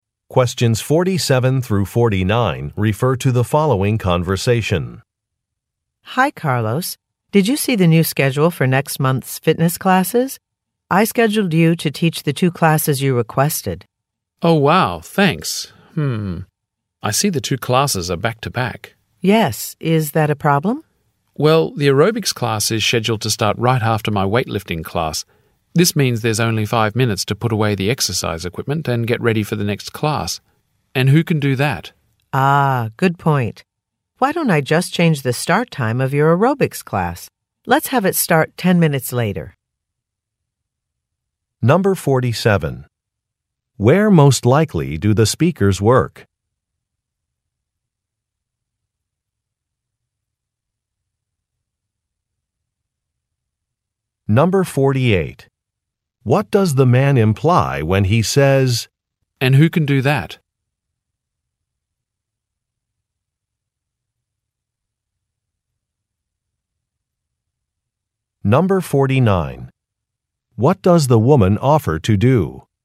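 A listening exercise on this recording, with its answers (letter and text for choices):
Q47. Where most likely do the speakers work?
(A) At a sporting goods store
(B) At a hospital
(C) At a warehouse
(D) At a fitness center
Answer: (D) At a fitness center

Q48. What does the man imply when he says, "and who can do that"?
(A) He is asking for a volunteer.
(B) He wants to know the name of a staff member.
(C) He thinks a task is impossible.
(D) He is interested in an applicant's qualifications.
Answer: (C) He thinks a task is impossible.

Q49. What does the woman offer to do?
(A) Change a schedule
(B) Check the inventory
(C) Clean up a work space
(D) Respond to an inquiry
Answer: (A) Change a schedule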